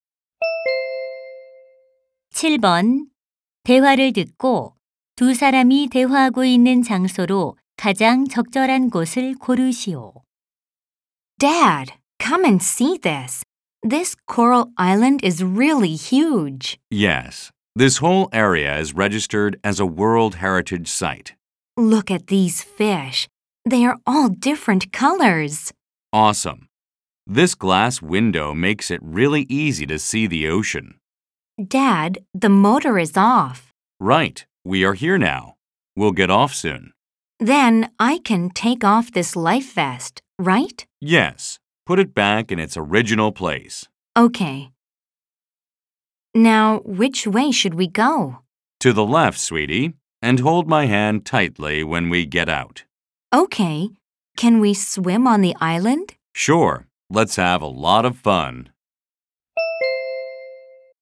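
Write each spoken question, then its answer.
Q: 대화를 듣고 두 사람이 대화하고 있는 장소로 가장 적절한 곳을 고르시오.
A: 유리 바닥 보트(배) 안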